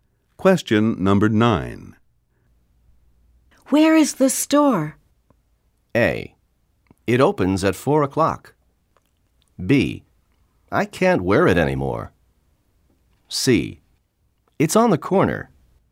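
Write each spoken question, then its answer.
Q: Where is the store?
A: C: It's on the corner.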